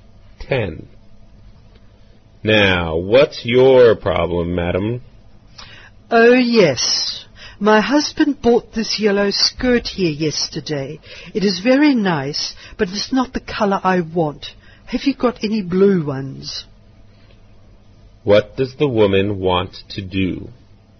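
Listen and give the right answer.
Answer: Exchange the yellow skirt for a blue one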